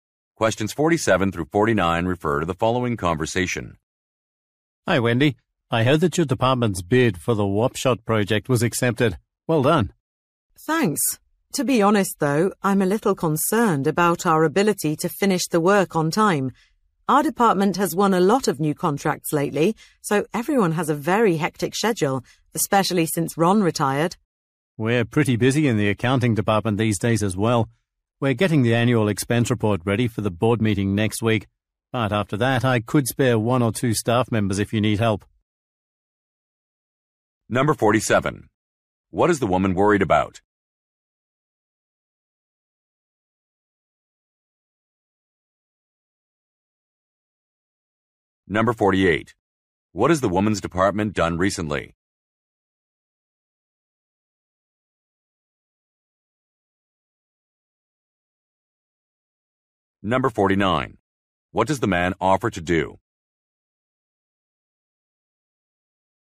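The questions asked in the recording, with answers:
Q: What is the woman worried about?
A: Finishing the project on time

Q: What has the woman's department done recently?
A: Won a lot of new contracts

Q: What does the man offer to do?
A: Lend one or two staff members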